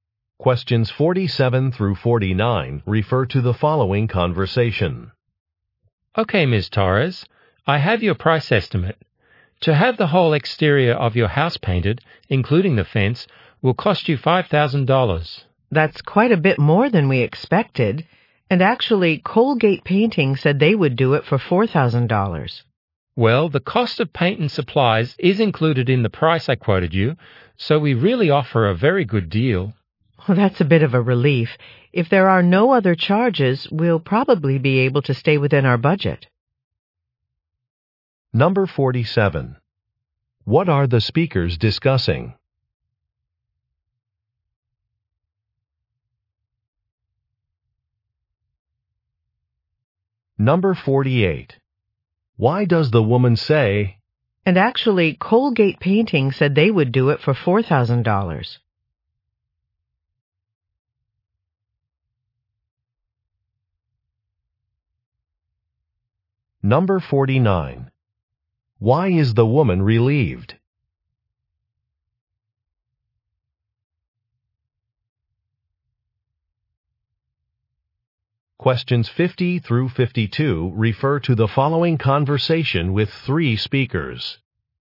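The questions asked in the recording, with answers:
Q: What are the speakers discussing?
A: A price estimate for painting a house

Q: Why is the woman relieved?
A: Paint and supplies are included in the price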